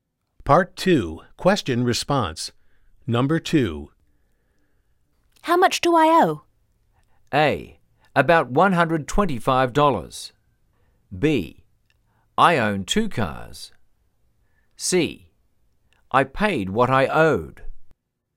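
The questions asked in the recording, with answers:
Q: How much do I owe?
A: A: About $125.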